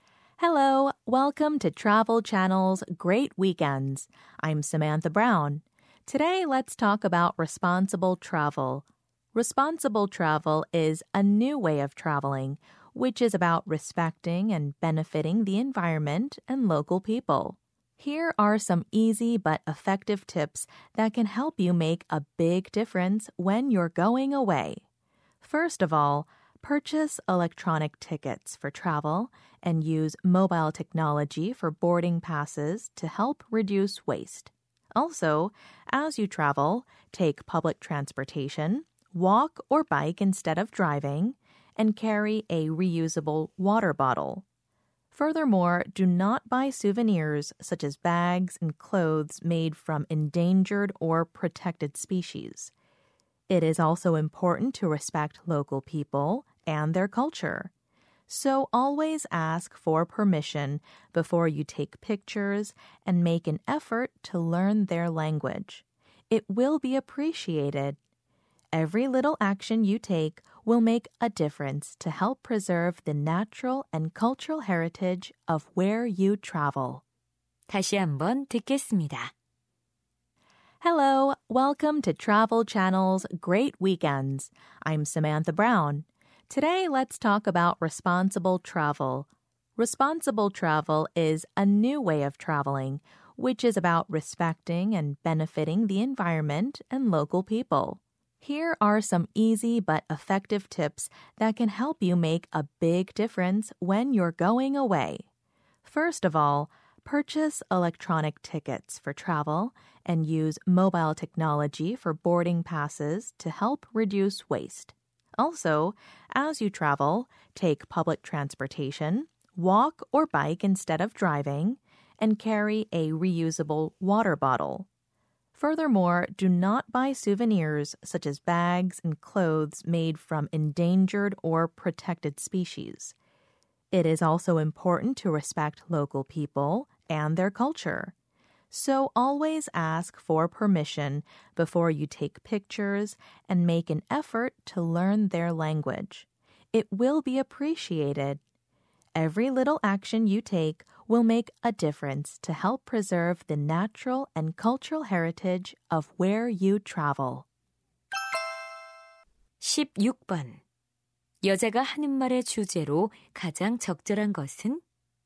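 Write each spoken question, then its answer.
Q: 여자가 하는 말의 주제로 가장 적절한 것은?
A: 책임감 있는 여행을 위한 방법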